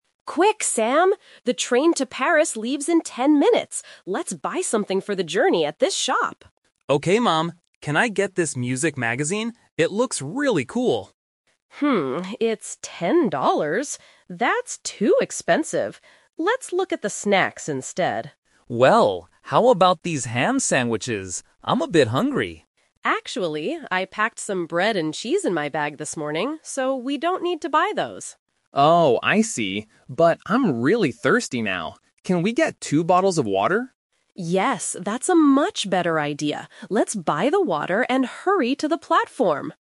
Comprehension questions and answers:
Listen to the conversation between a mother and her child at the train station and choose the best answer (A, B, or C).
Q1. Why did they NOT buy the magazine?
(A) Because it was boring.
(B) Because it was too expensive.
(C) Because Sam didn't like the music.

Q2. Why did Mom say "no" to the sandwiches?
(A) Because she already has food in her bag.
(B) Because they don't have enough time.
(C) Because Sam isn't really hungry.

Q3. What did they finally buy for the train trip?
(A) Some magazines.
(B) Ham sandwiches.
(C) Two bottles of water.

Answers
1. (B) Because it was too expensive.
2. (A) Because she already has food in her bag.
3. (C) Two bottles of water.

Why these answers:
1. Sam wants the magazine, but Mom says, "it's 10 dollars! That's too expensive." Option (A) is a distractor because Sam actually thinks it looks "cool" (interesting).
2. Sam suggests buying sandwiches, but Mom uses "The Twist" technique: "Actually, I packed some bread and cheese in my bag... so we don't need to buy those." Option (B) mentions time, which is in the script, but it's not the reason they rejected the sandwiches.
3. After rejecting the magazine and sandwiches, they agree to buy water because Sam is thirsty. Mom says, "Let's buy the water." Options (A) and (B) are "The Traps" because they were mentioned but rejected.

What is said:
Mom: Quick, Sam! The train to Paris leaves in ten minutes. Let's buy something for the journey at this shop.
Sam: Okay, Mom. Can I get this music magazine? It looks really cool.
That's too expensive. Let's look at the snacks instead.
Sam: Well... how about these ham sandwiches? I'm a bit hungry.
Mom: Actually, I packed some bread and cheese in my bag this morning, so we don't need to buy those.
Sam: Oh, I see. But I'm really thirsty now. Can we get two bottles of water?
Mom: Yes, that's a much better idea. Let's buy the water and hurry to the platform!

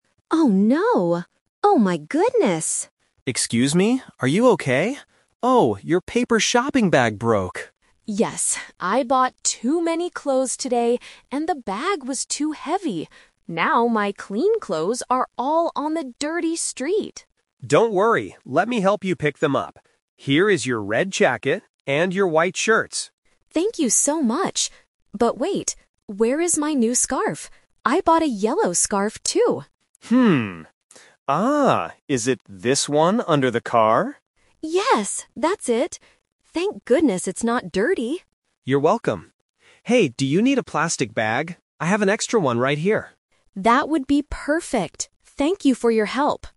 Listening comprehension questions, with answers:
Listen to the conversation between two people on the street and choose the correct answer (A, B, or C).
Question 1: What happened to the woman's shopping bag?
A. She left it in the clothing store.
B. It broke because it was too heavy.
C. A stranger took it from her.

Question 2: Which item was the woman worried about losing?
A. Her white shirts.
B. A red jacket.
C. A yellow scarf.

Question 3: What does the man give the woman at the end of the conversation?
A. A plastic bag.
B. A paper bag.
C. A new jacket.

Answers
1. B. It broke because it was too heavy.
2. C. A yellow scarf.
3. A. A plastic bag.

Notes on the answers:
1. Mark says, "your paper shopping bag broke!" and Sarah explains that she bought too many clothes "and the bag was too heavy." Option (A) and (C) are plausible problems, but they are not mentioned in the audio.
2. Mark picks up the red jacket and white shirts (Options A and B - the traps). Then, Sarah changes the focus (The Twist) by saying, "But wait... where is my new scarf? I bought a yellow scarf, too." Mark finds it under a car.
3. Because Sarah's bag is broken, Mark asks, "do you need a plastic bag? I have an extra one right here." Sarah says yes. Option (B) is the trap; a paper bag is what broke at the beginning of the story, not what Mark gives her. Option (C) is incorrect.

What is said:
Sarah: Oh no! Oh, my goodness!
Mark: Excuse me, are you okay? Oh, your paper shopping bag broke!
Sarah: Yes, I bought too many clothes today, and the bag was too heavy. Now my clean clothes are all on the dirty street.
Mark: Don't worry, let me help you pick them up. Here is your red jacket and your white shirts.
Sarah: Thank you so much. But wait... where is my new scarf? I bought a yellow scarf, too.
Mark: Hmm... Ah, is it this one under the car?
Sarah: Yes, that's it! Thank goodness it's not dirty.
Mark: You're welcome. Hey, do you need a plastic bag?

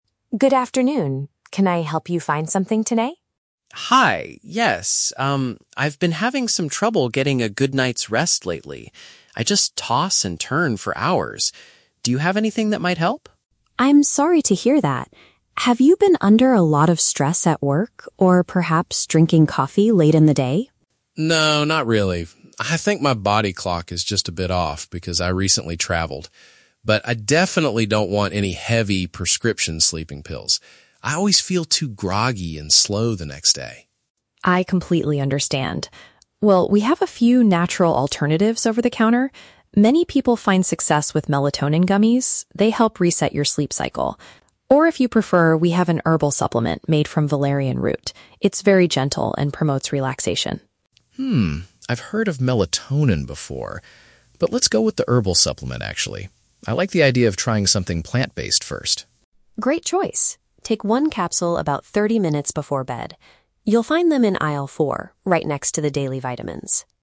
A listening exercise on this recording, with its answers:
Listen to a conversation between a pharmacist and a customer. Choose the correct answer (A, B, or C) for each question.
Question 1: What does Mark believe is the reason for his sleeping problem?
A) He has been dealing with high pressure at his workplace.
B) He took a trip recently which affected his natural rhythm.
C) He consumes too much caffeine in the afternoon.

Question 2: What is Mark's main concern about using strong sleeping medicine?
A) He does not want to feel exhausted and unfocused the following morning.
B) He is afraid of becoming addicted to pharmacy drugs.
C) He thinks that prescription pills are far too expensive.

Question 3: Which product does Mark decide to purchase?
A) Sweet candies that contain melatonin.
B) A bottle of standard daily vitamins.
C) A natural item extracted from a plant.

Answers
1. B) He took a trip recently which affected his natural rhythm.
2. A) He does not want to feel exhausted and unfocused the following morning.
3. C) A natural item extracted from a plant.

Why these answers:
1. Mark says his "body clock is just a bit off" because he "recently traveled". This is paraphrased in option B as "took a trip recently which affected his natural rhythm". The Trap (A): Nancy asks if he has been under "stress at work" (high pressure at workplace), but Mark explicitly says "No, not really" (Mentioned but rejected). The Trap (C): Nancy also suggests "drinking coffee late in the day" (consuming caffeine), but Mark rejects this reason as well (Mentioned but rejected).
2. Mark says he doesn't want prescription pills because he feels "too groggy and slow the next day". "Groggy and slow" is paraphrased as feeling "exhausted and unfocused". Plausible Trap (B): Fear of addiction is a very common and logical reason to avoid sleeping pills, but Mark never mentions this in the audio (Plausible but not mentioned). Plausible Trap (C): The cost of medicine is a realistic concern, but it is not mentioned in the conversation.
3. Mark chooses the "herbal supplement" because he likes the idea of "something plant-based". This perfectly matches "A natural item extracted from a plant". The Trap (A): Melatonin gummies (sweet candies) are suggested by Nancy, but Mark decides against them, choosing the herbal option instead (Mentioned but rejected). The Trap (B): "Daily vitamins" are mentioned at the very end of the audio, but only as a location ("right next to the daily vitamins") to help Mark find his herbal supplement. He is not buying them.

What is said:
Nancy: Good afternoon. Can I help you find something today?
Mark: Hi, yes. Um, I've been having some trouble getting a good night's rest lately. I just toss and turn for hours. Do you have anything that might help?
Nancy: I'm sorry to hear that. Have you been under a lot of stress at work, or perhaps drinking coffee late in the day?
Mark: No, not really. I think my body clock is just a bit off because I recently traveled. But I definitely don't want any heavy, prescription sleeping pills. I always feel too groggy and slow the next day.
Nancy: I completely understand. Well, we have a few natural alternatives over the counter. Many people find success with melatonin gummies; they help reset your sleep cycle. Or, if you prefer, we have an herbal supplement made from Valerian root. It's very gentle and promotes relaxation.
Mark: Hmm, I've heard of melatonin before. But let's go with the herbal supplement, actually. I like the idea of trying something plant-based first.
Nancy: Great choice. Take one capsule about 30 minutes before bed. You'll find them in aisle 4, right next to the daily vitamins.

